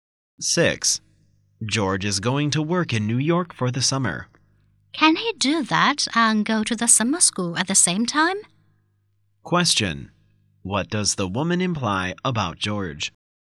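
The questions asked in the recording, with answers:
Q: What does the woman imply about George?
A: He probably can't work in New York and go to summer school at the same time.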